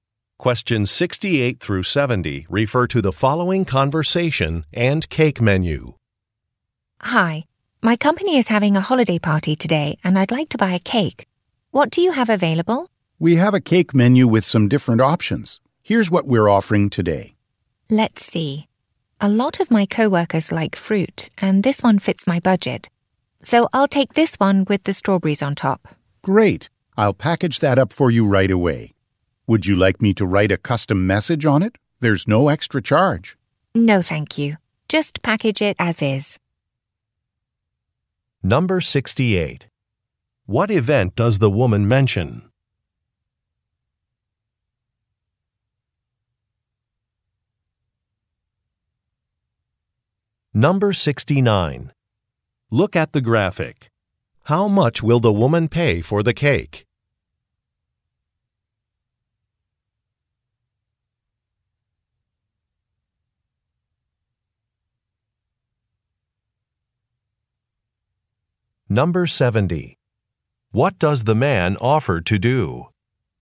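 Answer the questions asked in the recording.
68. A company holiday party
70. Write a custom message on the cake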